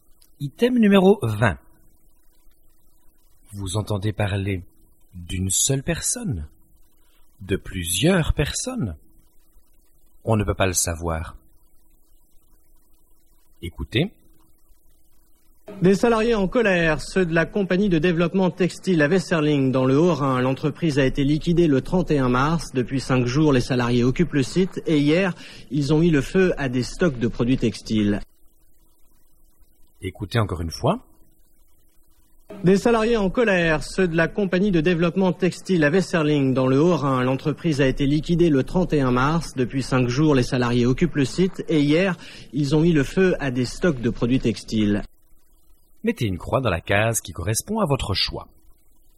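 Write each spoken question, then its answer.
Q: Vous entendez parler d'une seule personne, de plusieurs personnes.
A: de plusieurs personnes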